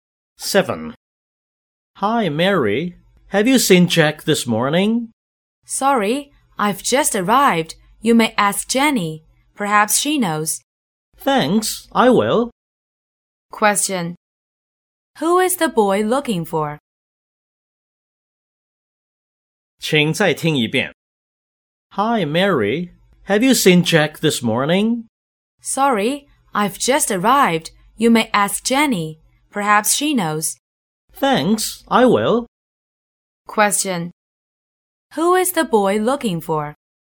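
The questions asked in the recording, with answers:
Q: Who is the boy looking for?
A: Jack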